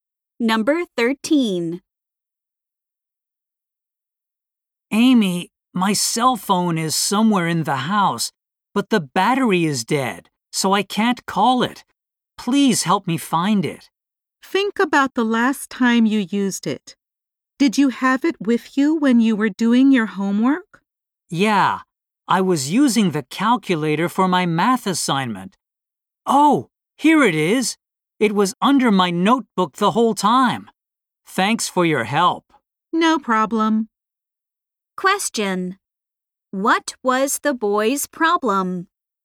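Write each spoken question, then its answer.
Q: What was the boy's problem?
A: He couldn't find his cell phone.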